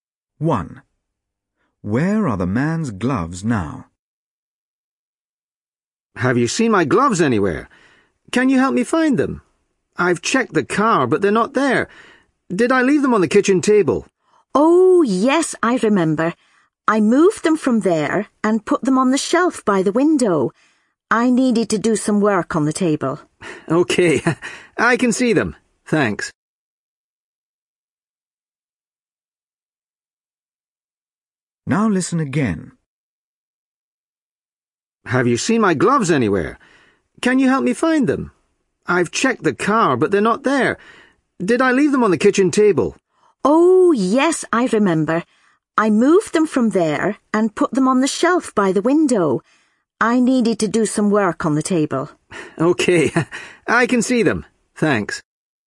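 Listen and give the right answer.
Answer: On the shelf by the window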